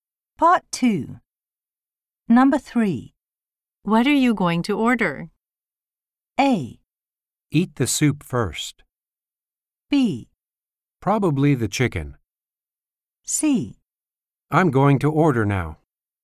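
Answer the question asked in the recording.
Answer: B: Probably the chicken.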